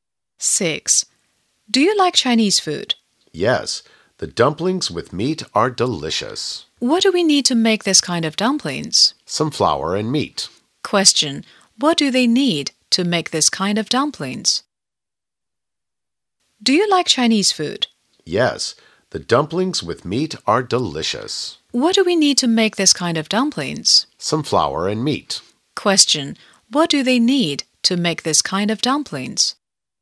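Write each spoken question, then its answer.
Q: What do they need to make this kind of dumplings?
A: Some flour and meat.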